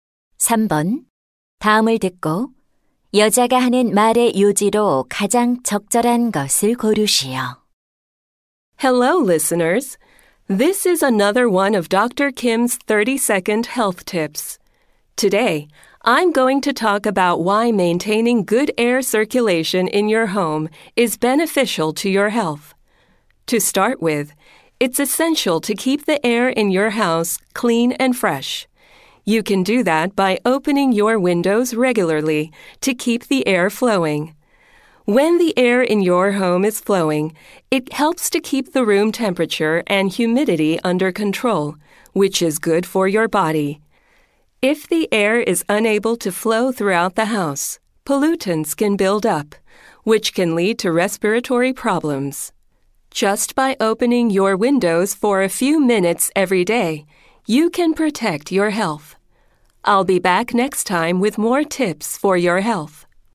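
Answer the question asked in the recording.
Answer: 집 안의 공기를 잘 순환시키면 건강에 도움이 된다.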